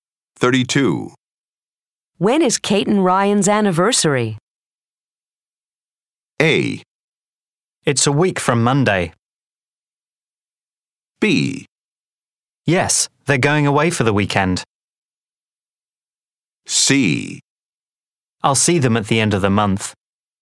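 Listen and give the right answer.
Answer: A: It's a week from Monday.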